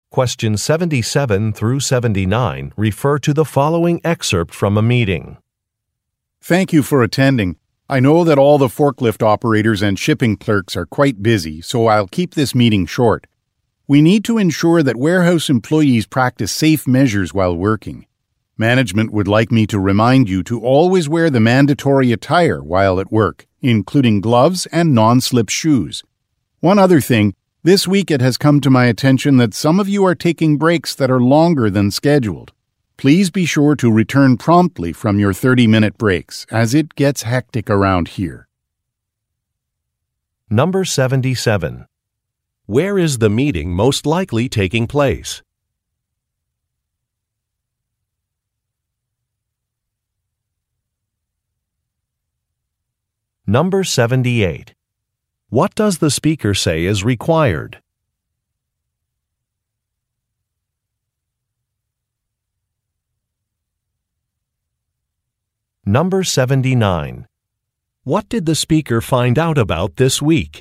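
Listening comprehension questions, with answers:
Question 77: Where is the meeting most likely taking place?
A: At a warehouse

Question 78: What does the speaker say is required?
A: Wearing the appropriate clothing

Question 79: What did the speaker find out about this week?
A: Workers have been taking extended breaks.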